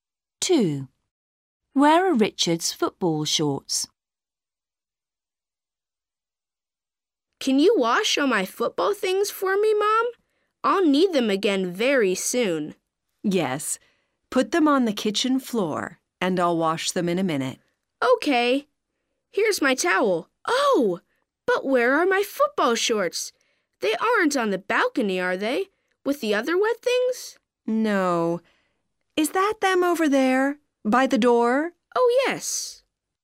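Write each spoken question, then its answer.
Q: Where are Richard's football shorts?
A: by the door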